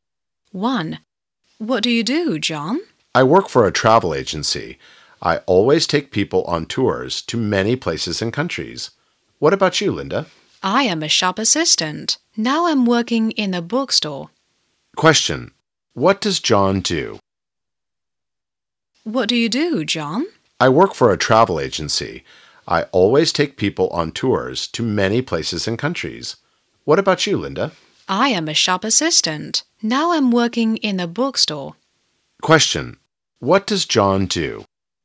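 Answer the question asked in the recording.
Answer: He works for a travel agency (takes people on tours).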